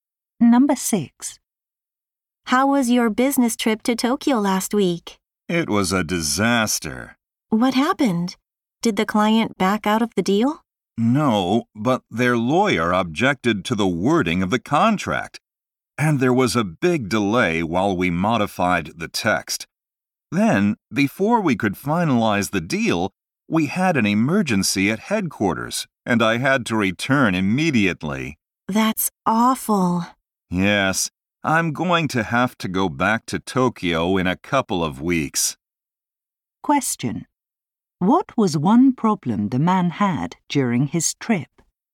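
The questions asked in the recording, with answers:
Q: What was one problem the man had during his trip?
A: The client's lawyer objected to the contract wording, causing a delay.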